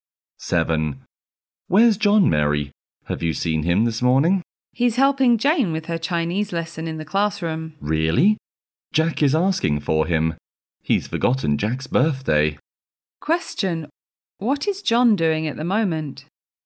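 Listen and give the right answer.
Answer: Helping Jane with her Chinese lesson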